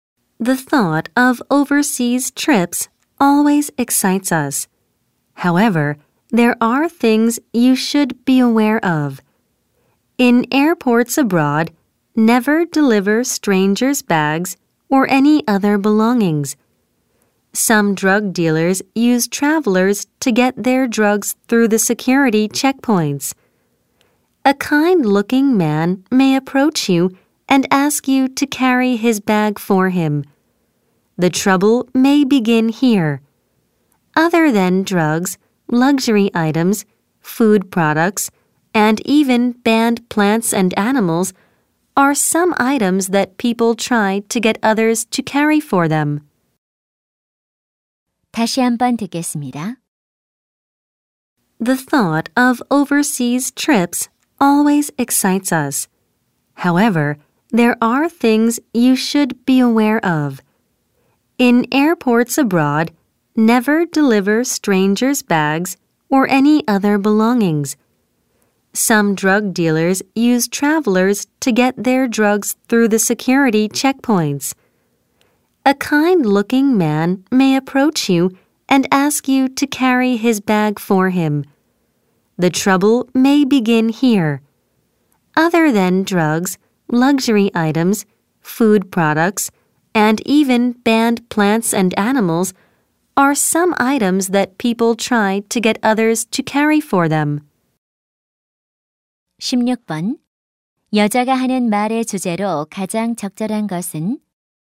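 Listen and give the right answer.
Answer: 해외 공항에서 낯선 사람의 짐을 대신 운반하는 것의 위험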